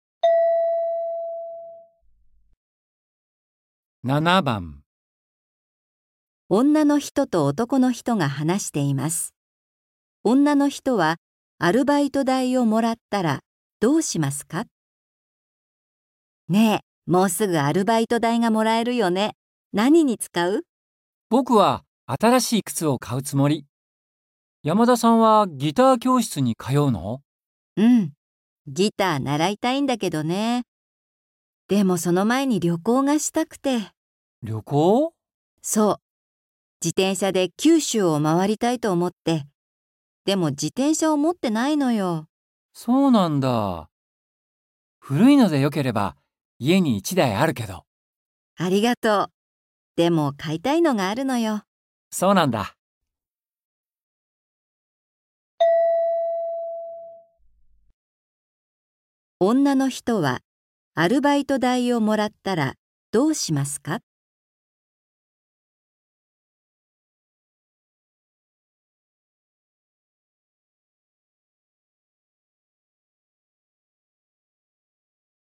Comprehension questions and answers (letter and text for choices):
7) 女の人は、アルバイト代をもらったら、どうしますか。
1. 靴を買う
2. ギター教室に通う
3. 自転車を買う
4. 旅行をする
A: 3. 自転車を買う

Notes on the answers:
F: もうすぐアルバイト代がもらえるよね。何に使う? M: 僕は新しい靴を買うよ。山田さんはギター教室に通うんだっけ? F: うん。ギター、習いたいんだけどね。でも、その前に旅行がしたくて。 M: 旅行? F: そう。自転車で九州を回りたいと思って。でも、自転車を持っているよ。 M: そうなんだ。古いので、よければ、家に1台あるけど。 F: ありがとう。でも、買いたいのがあ るのよ。

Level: 初級